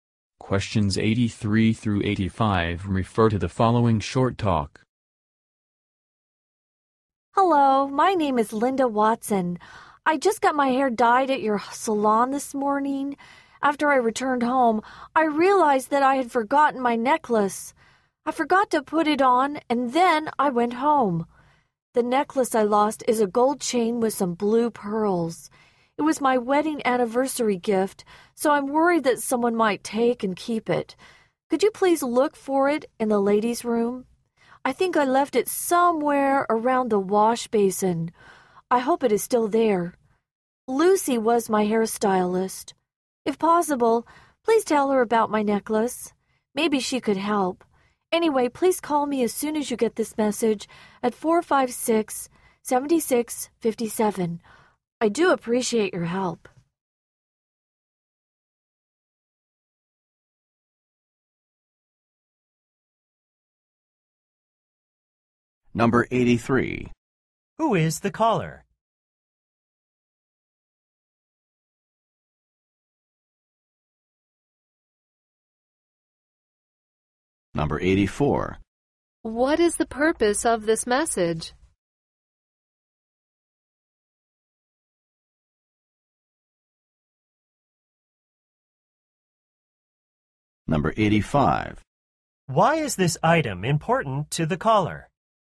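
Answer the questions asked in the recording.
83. A salon customer, Linda Watson
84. To ask the salon to look for her lost necklace
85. It was her wedding anniversary gift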